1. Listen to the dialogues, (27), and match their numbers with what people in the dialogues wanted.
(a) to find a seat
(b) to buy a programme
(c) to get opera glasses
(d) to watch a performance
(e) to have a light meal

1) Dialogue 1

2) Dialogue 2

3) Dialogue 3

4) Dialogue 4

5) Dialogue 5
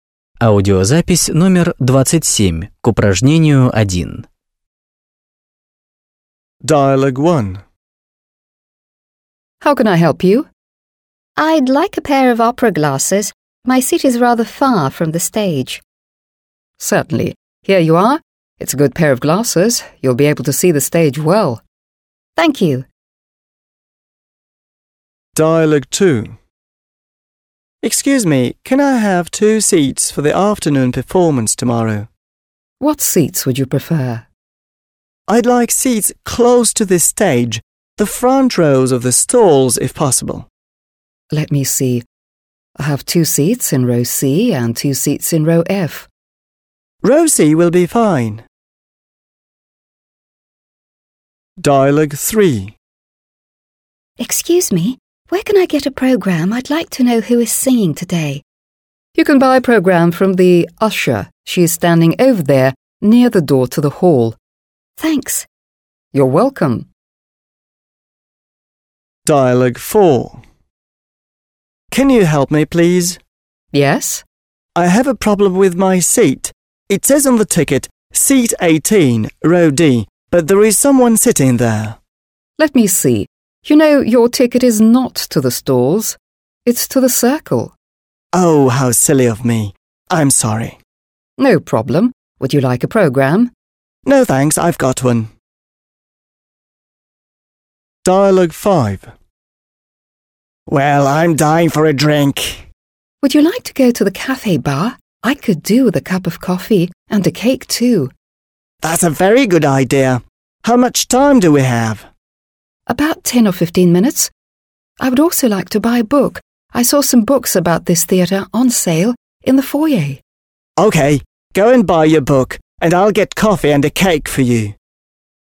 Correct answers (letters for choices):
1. c
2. d
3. b
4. a
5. e

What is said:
− I'd like a pair of opera glasses. My seat is rather far from the stage.
− Certainly. Here you are. It's a good pair of glasses. You'll be able to see the stage well.
− Thank you. – Спасибо.
− Excuse me, can I have two seats for the afternoon performance tomorrow?
− I like seats close to the stage, the front rows of the stalls if possible.
− Let me see. I have two seats in Row C and two seats in Row F.
− Row C will be fine. – Ряд C подойдет.
− Excuse me, where can I get a programme? I'd like to know who is singing today.
− You can buy a programme from the usher. She is standing over there near the door to the hall.
− You're welcome. – Пожалуйста.
− I have a problem with my seat. It says on the ticket: "Seat 18, Row D" but there is someone sitting there.
− Let me see. You know, your ticket is not to the stalls, it's to the circle.
− No problem. Would you like a programme? – Без проблем. Хотите программу?
− Would you like to go to the coffee bar? I could do with a cup of coffee and cake too.
− It's a very good idea. How much time do we have?
− About 10 or 15 minutes. I would also like to buy a book. I saw some books about this theatre on sale in the foyer.
− OK. Go and buy your book and I'll get coffee and a cake for you.

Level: 8 класс